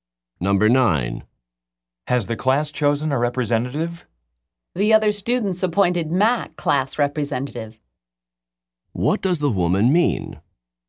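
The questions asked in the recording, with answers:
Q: What does the woman mean?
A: Matt was chosen as class representative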